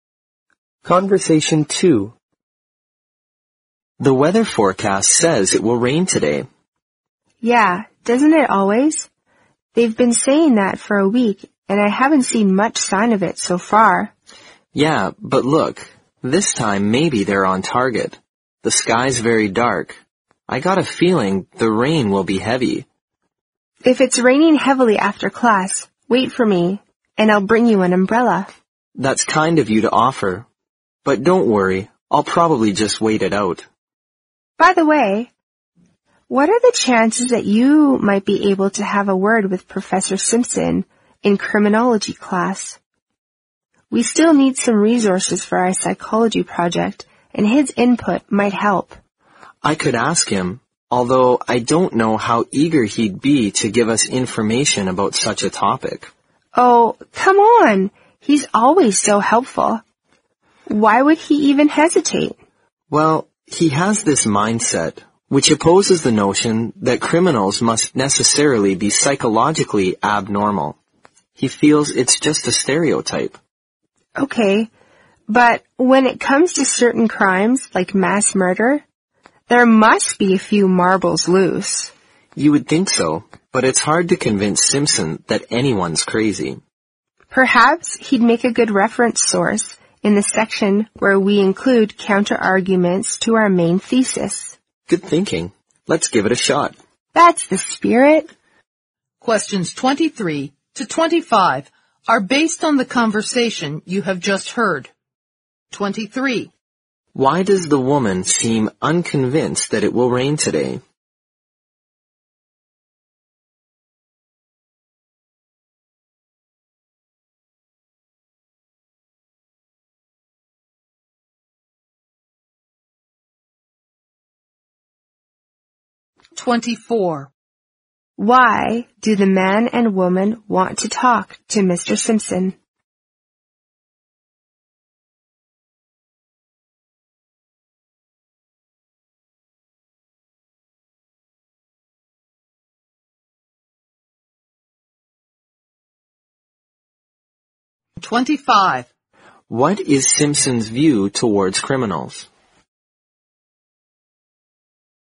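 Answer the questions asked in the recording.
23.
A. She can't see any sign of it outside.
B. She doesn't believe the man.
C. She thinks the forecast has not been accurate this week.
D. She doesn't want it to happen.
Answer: C. She thinks the forecast has not been accurate this week.
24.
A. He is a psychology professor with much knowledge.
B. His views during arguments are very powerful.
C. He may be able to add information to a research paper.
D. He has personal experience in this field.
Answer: C. He may be able to add information to a research paper.
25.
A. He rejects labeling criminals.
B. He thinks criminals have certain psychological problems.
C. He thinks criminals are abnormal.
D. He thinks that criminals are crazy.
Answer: A. He rejects labeling criminals.

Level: 新编四级听力练习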